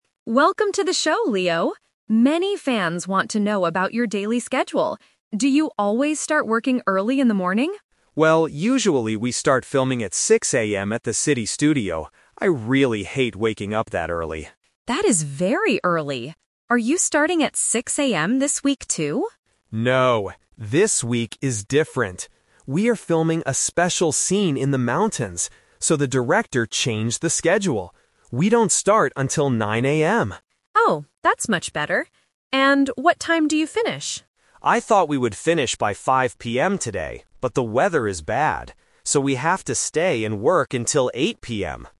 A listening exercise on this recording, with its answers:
Listen to the interview and choose the correct answer (A, B, or C) for each question.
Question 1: What time does Leo start filming this week?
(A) 6:00 AM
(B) 9:00 AM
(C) 10:00 AM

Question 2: Where is Leo filming right now?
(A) At the city studio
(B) In a park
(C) In the mountains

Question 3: Why does Leo have to work until 8:00 PM today?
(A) Because he woke up late.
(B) Because the weather is bad.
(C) Because the director wants to film more scenes.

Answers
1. B
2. C
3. B

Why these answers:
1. Leo usually starts at 6:00 AM (Option A is the trap), but he says "No, this week is different... We don't start until 9:00 AM." Option C is not mentioned.
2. Leo usually films at the "city studio" (Option A is the trap), but for this week's special scene, they are filming "in the mountains." Option B is not mentioned.
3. Leo thought they would finish at 5:00 PM, "but the weather is bad." "So," they have to work until 8:00 PM. Options A and C are plausible reasons but are not mentioned in the audio.

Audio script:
Reporter: Welcome to the show, Leo! Many fans want to know about your daily schedule. Do you always start working early in the morning?
Leo: Well, usually we start filming at 6:00 AM at the city studio. I really hate waking up that early!
Reporter: That is very early! Are you starting at 6:00 AM this week, too?
Leo: No, this week is different. We are filming a special scene in the mountains, so the director changed the schedule.
Reporter: Oh, that's much better! And what time do you finish?

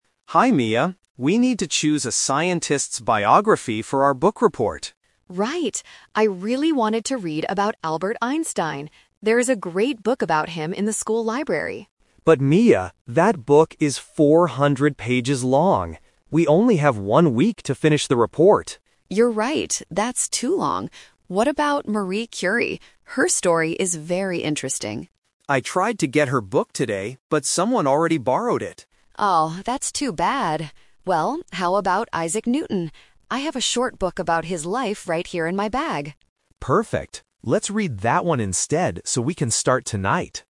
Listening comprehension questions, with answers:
Listen to two students talking about a book report. Choose the correct answer A, B, or C.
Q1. Whose biography did Mia originally want to read?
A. Isaac Newton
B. Albert Einstein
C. Marie Curie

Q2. Why didn't they choose the book about Marie Curie?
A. Someone else borrowed it.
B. It was 400 pages long.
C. It was not in the library.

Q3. Which book will they use for their report?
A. The book about Albert Einstein.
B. The book about Marie Curie.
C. The book about Isaac Newton.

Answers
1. B
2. A
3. C

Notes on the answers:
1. Mia clearly states at the beginning, "I really wanted to read about Albert Einstein." Trap: Options A and C are traps because they are the other scientists mentioned later in the conversation.
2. Leo says they can't use Marie Curie's book because "someone already borrowed it." Trap: Option B (400 pages long) is a trap because that is the reason they rejected the Albert Einstein book, not the Marie Curie book.
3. After rejecting the first two options, Mia suggests Isaac Newton and Leo says "Perfect! Let's read that one instead." This is their final decision. Trap: Options A and B are traps. They are the books the students discussed but decided not to use.

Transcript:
Leo: Hi Mia. We need to choose a scientist's biography for our book report.
Mia: Right! I really wanted to read about Albert Einstein. There is a great book about him in the school library.
Leo: But Mia, that book is 400 pages long! We only have one week to finish the report.
Mia: You're right, that's too long. What about Marie Curie? Her story is very interesting.
Leo: I tried to get her book today, but someone already borrowed it.
Mia: Oh, that's too bad. Well, how about Isaac Newton? I have a short book about his life right here in my bag.

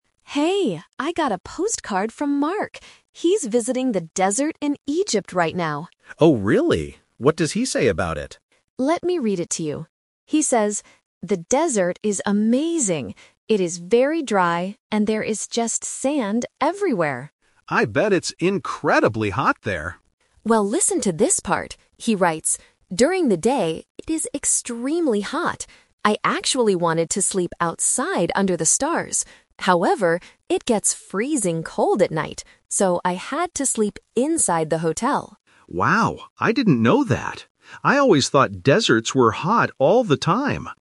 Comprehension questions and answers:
Listen to the conversation between two friends about a postcard. Choose the correct answer (A, B, or C) for each question.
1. How does Mark describe the desert?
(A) It is full of sand and very dry.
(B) It is green and beautiful.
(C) It is wet and windy.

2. What is the weather like in the desert at night?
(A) It is very hot.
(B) It is freezing cold.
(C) It is warm and relaxing.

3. Where did Mark sleep at night?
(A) Outside under the stars.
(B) In a tent on the sand.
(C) Inside a hotel.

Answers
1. A
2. B
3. C

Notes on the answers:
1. Why A is correct: The woman reads directly from the postcard: "It is very dry and there is just sand everywhere." Why B & C are wrong: The audio does not mention that the desert is green, wet, or windy. These are plausible geographical descriptions but not for this desert.
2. Why B is correct: The postcard clearly states, "it gets freezing cold at night!" Why A is a trap: The audio mentions "extremely hot", but that is the weather during the day, not at night. The man also mistakenly thought deserts were "hot all the time". Why C is wrong: "Warm and relaxing" is not mentioned in the audio.
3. Why C is correct: This is the A2 "Twist". Because it was too cold, Mark says: "So, I had to sleep inside the hotel." Why A is a trap: Mark says he wanted to sleep outside under the stars, but his plan changed because of the cold weather. Why B is wrong: A tent is a logical place to sleep in a desert, but it is not mentioned in the audio.

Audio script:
Woman: Hey, I got a postcard from Mark! He's visiting the desert in Egypt right now.
Man: Oh, really? What does he say about it?
Woman: Let me read it to you. He says, "The desert is amazing! It is very dry and there is just sand everywhere."
Man: I bet it's incredibly hot there.
Woman: Well, listen to this part. He writes, "During the day, it is extremely hot. I actually wanted to sleep outside under the stars. However, it gets freezing cold at night! So, I had to sleep inside the hotel."

